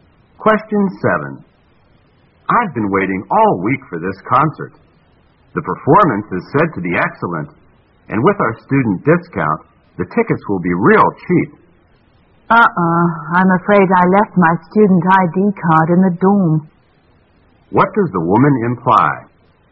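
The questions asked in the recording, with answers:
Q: What does the woman imply?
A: She may not get the student discount because she left her ID card in the dorm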